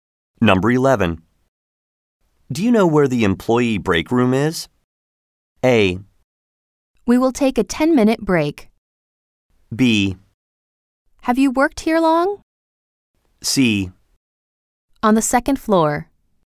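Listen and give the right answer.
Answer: C: On the second floor.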